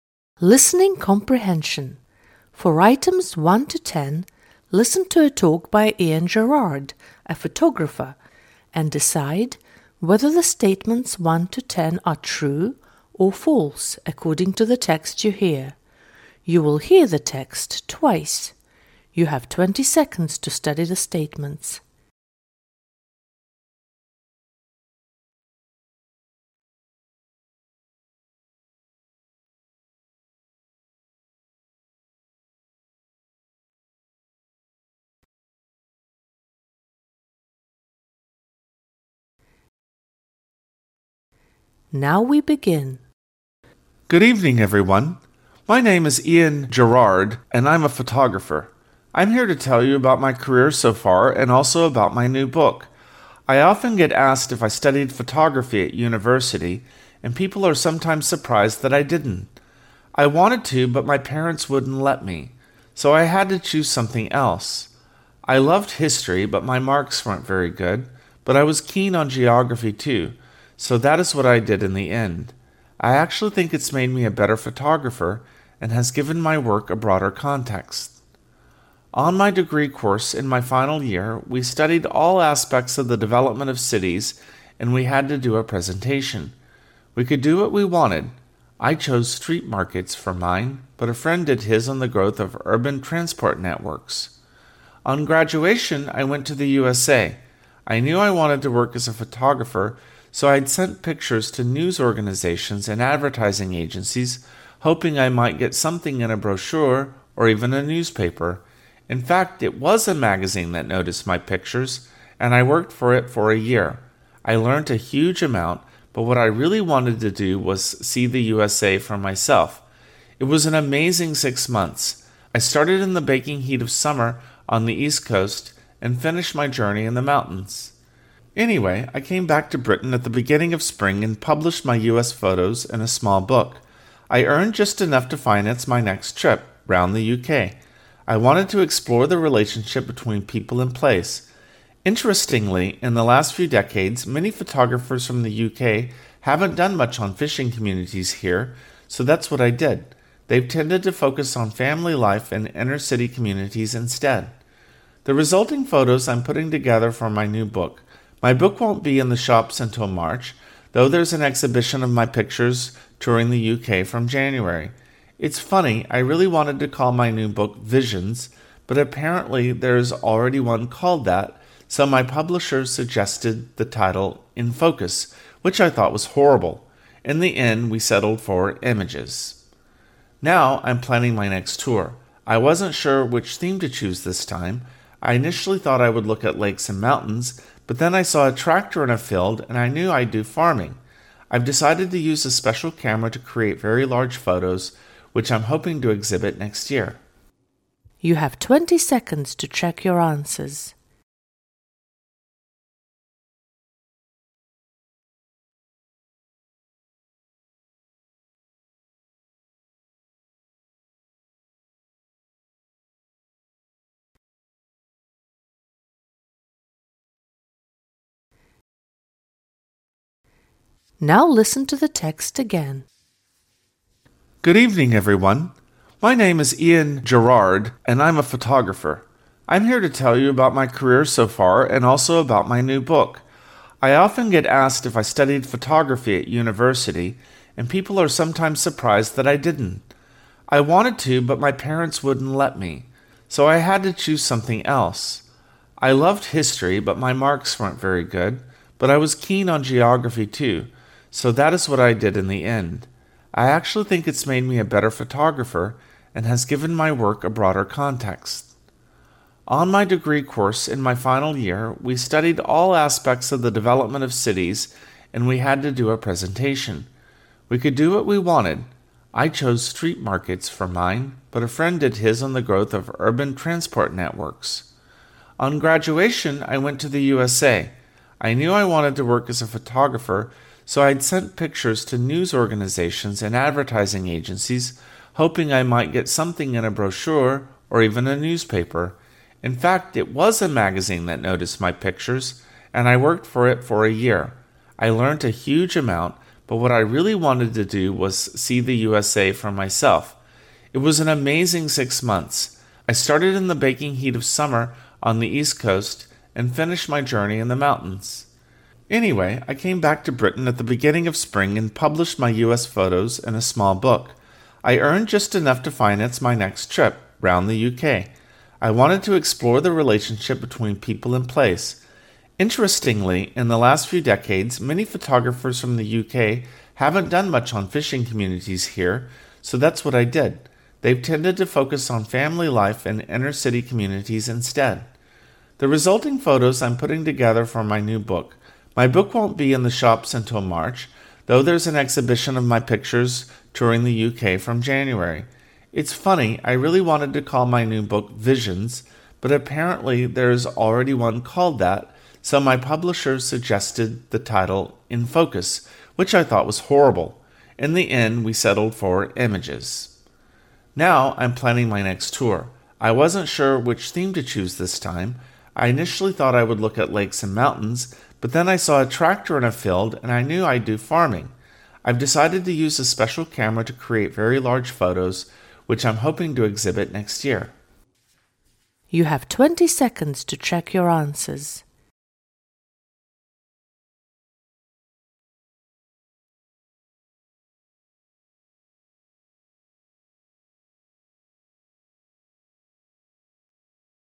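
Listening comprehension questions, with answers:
For items 1-10 listen to a talk by Ian Gerrard, a photographer, and decide whether the statements (1-10) are TRUE, or FALSE according to the text you hear. You will hear the text twice.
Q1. lan's parents didn't allow him to major in photography.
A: TRUE

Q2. lan's interest in history boosted his photography talents.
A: FALSE

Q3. In his last year, lan made a joint project with his friend on open-air markets.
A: FALSE

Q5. It took lan half a year to make amazing pictures for an American magazine.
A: FALSE

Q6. American photos helped lan raise funds for his British journey.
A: TRUE

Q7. In the last decades, British photographers have ignored family life in fishing communities.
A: FALSE

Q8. lan's new book will have been sold out by March.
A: FALSE

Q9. lan considered several titles for his book.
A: TRUE

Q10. lan's next exhibition will be devoted to lakes and mountains.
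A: FALSE

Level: 9 класс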